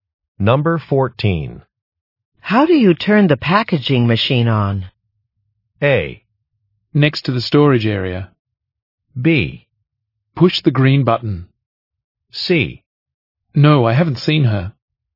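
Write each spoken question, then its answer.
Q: How do you turn the packaging machine on?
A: B: Push the green button.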